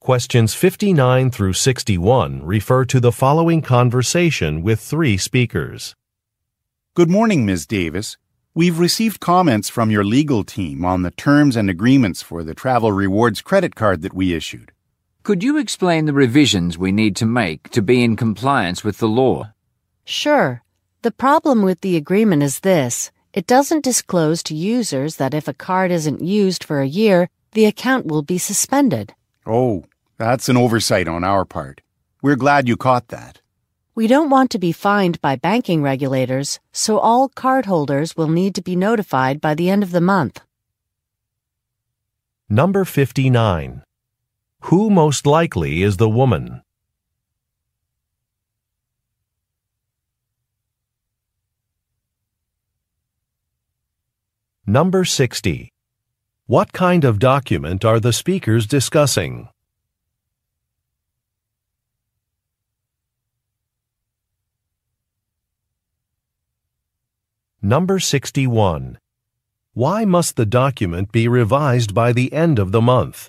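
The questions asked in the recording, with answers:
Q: What kind of document are the speakers discussing?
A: A credit card agreement

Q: Why must the document be revised by the end of the month?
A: To avoid being fined by banking regulators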